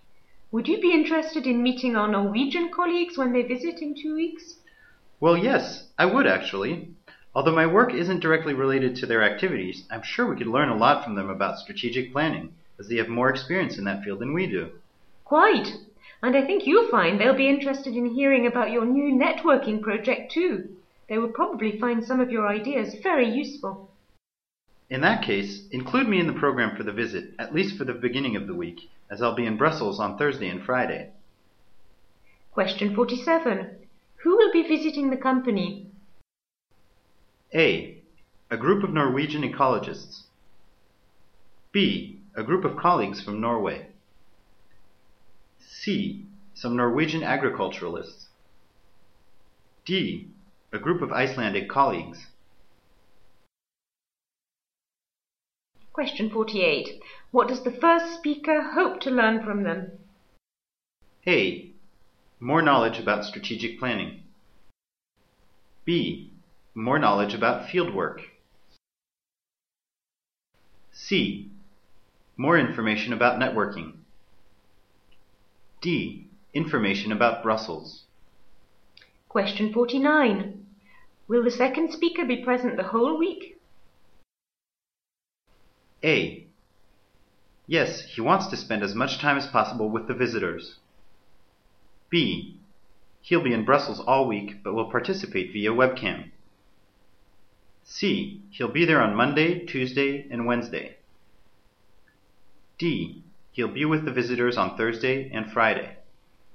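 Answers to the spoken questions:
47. B: A group of colleagues from Norway.
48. A: More knowledge about strategic planning.
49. C: He'll be there on Monday, Tuesday, and Wednesday.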